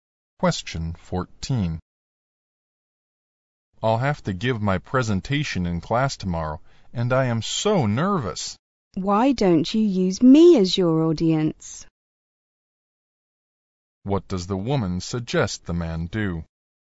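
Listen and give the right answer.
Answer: Practise his presentation in front of her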